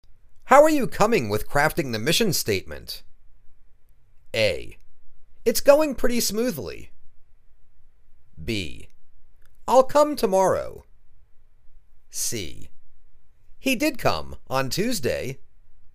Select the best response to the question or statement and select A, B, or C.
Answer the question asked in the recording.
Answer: It's going pretty smoothly.